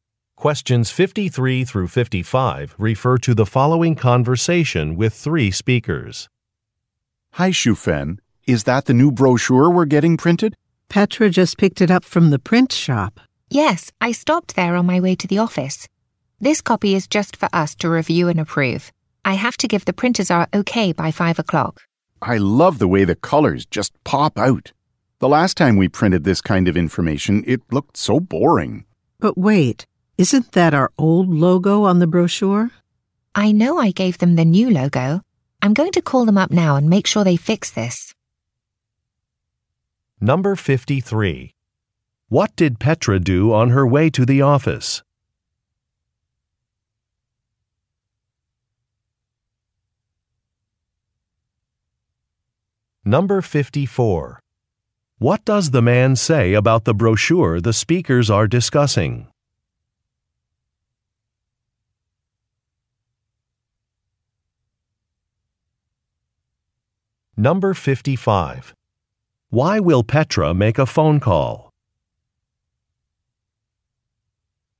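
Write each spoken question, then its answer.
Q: What did Petra do on her way to the office?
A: Picked up the brochure from the print shop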